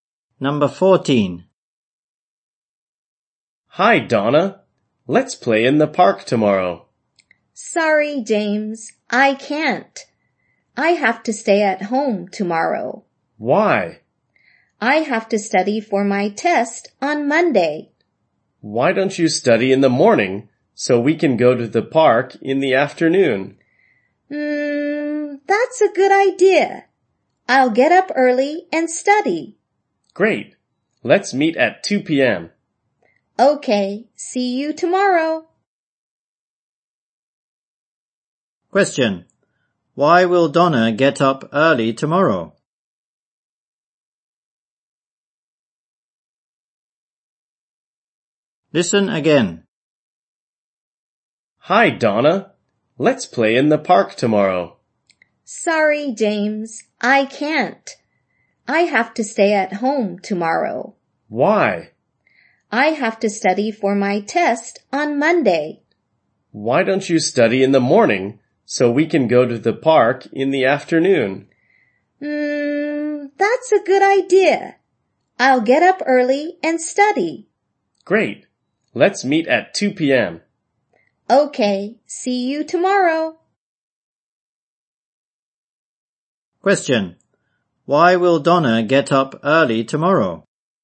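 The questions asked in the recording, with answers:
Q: Why will Donna get up early tomorrow?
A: To study for her test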